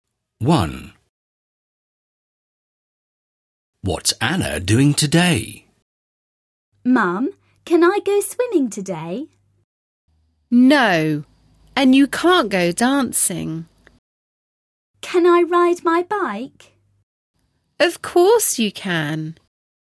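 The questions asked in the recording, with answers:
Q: What's Anna doing today?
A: Riding her bike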